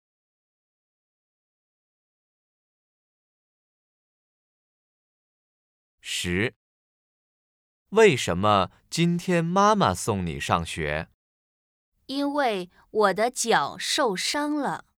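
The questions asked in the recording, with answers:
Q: 为什么今天妈妈送你上学?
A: 因为脚受伤了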